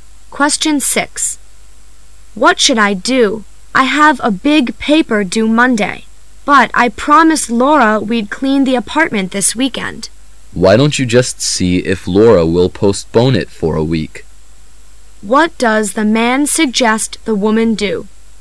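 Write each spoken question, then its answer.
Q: What does the man suggest the woman do?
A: Ask Laura to put off cleaning the apartment for a week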